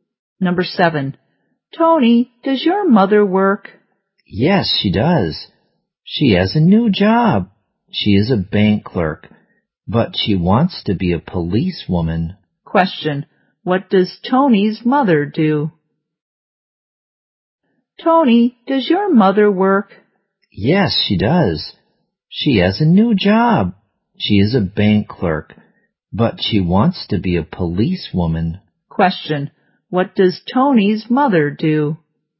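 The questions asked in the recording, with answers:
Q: Question, what does Tony's mother do?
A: She is a bank clerk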